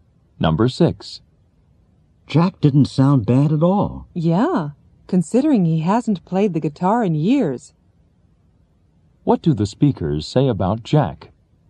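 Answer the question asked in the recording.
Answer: He played the guitar well even though he hadn't played in years.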